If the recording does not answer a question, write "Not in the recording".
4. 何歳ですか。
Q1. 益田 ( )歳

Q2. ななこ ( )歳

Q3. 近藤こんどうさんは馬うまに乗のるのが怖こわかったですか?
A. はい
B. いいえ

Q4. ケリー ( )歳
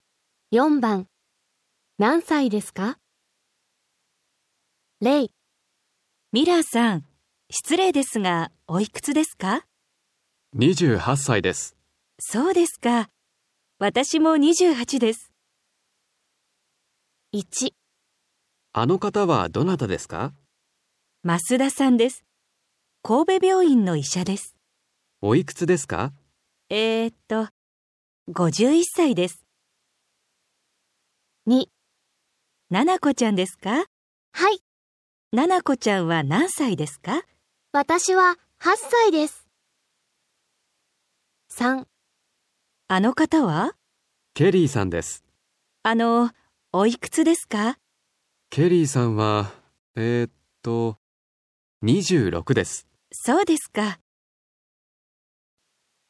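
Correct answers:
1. 51
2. 8
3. Not in the recording
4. 26

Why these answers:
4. B: ケリーさんは、 えーと、26です。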